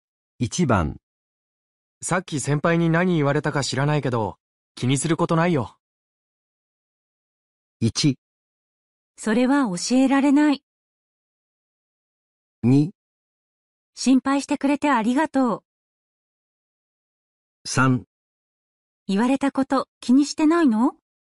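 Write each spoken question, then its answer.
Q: さっき先輩に何言われたか知らないけど、気にすることないよ。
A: 2: 心配してくれてありがとう。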